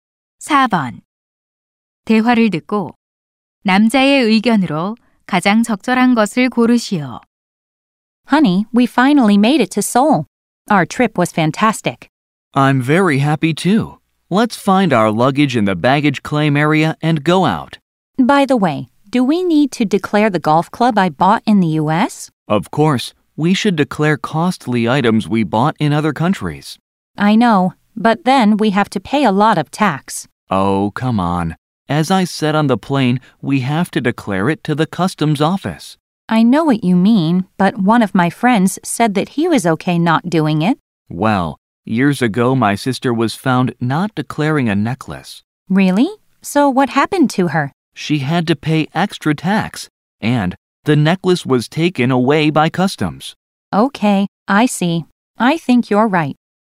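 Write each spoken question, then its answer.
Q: 대화를 듣고 남자의 의견으로 가장 적절한 것을 고르시오.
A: 해외에서 산 고가 물품은 세관에 신고해야 한다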